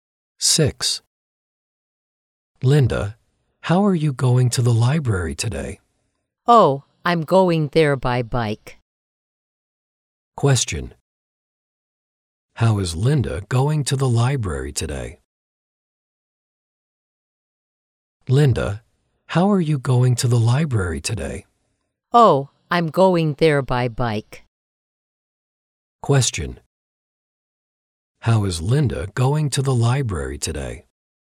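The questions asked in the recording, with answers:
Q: How is Linda going to the library today?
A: By bike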